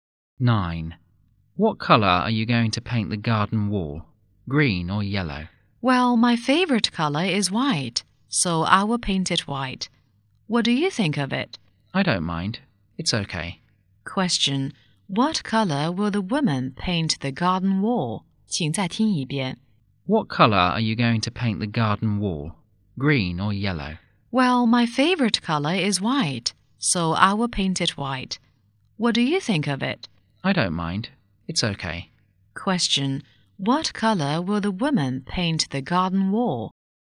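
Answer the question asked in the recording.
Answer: White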